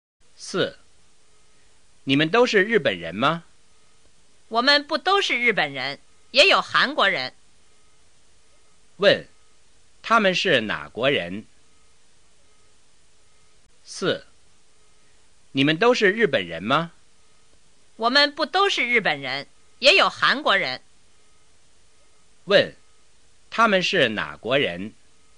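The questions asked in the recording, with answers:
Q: 他们是哪国人?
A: 有日本人,也有韩国人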